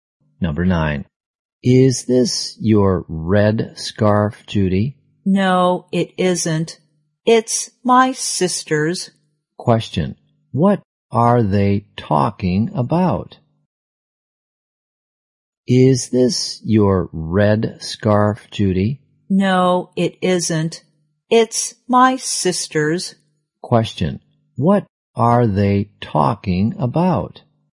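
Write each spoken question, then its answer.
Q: What are they talking about?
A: A red scarf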